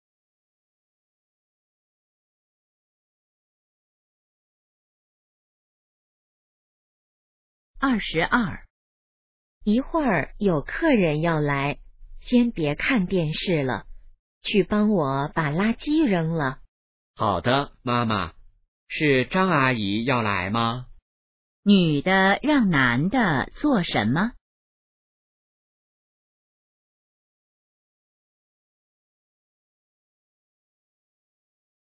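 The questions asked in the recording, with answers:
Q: 女的让男的做什么?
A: 扔垃圾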